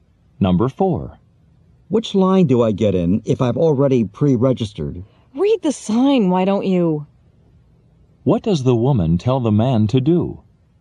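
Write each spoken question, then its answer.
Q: What does the woman tell the man to do?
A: Read the sign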